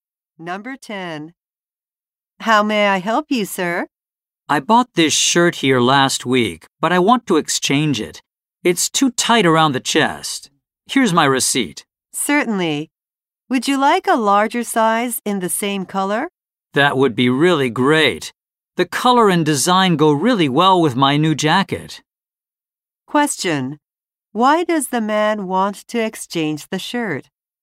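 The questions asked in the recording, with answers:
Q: Why does the man want to exchange the shirt?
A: It is too tight around the chest.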